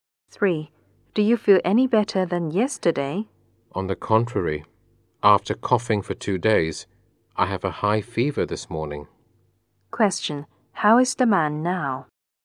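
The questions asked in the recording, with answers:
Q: how is the man now?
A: Worse; he has a high fever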